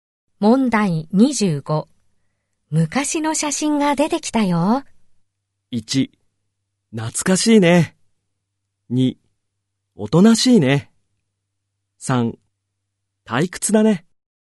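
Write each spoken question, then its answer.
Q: 昔の写真が出てきたよ。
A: 1: 懐かしいね。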